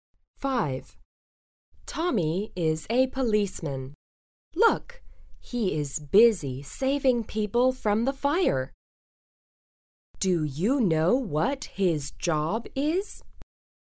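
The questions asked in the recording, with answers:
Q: Do you know what his job is?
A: He is a policeman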